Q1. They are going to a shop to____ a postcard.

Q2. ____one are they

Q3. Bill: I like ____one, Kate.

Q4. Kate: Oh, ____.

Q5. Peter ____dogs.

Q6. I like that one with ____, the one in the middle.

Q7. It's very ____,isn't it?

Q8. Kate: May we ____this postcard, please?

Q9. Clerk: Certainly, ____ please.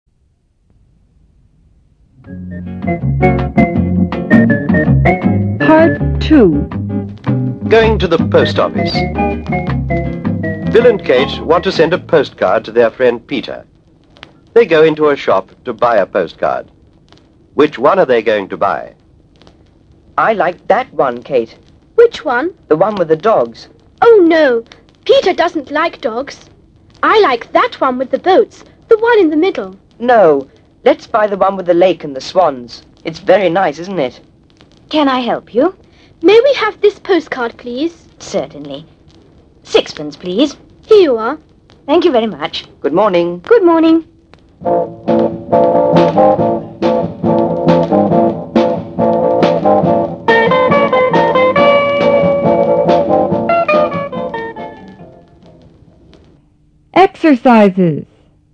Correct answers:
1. buy
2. which
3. that
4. no
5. doesn't like
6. boats
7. nice
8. have
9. 6 pence